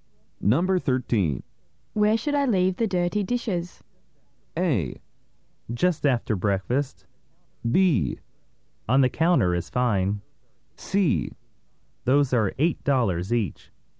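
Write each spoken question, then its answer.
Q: Where should I leave the dirty dishes?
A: B: On the counter is fine.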